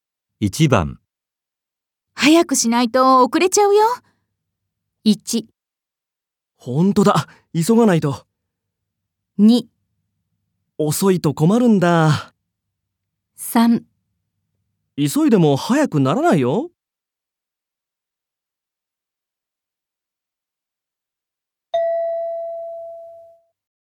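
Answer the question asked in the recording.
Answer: 1: 本当だ、急がないと。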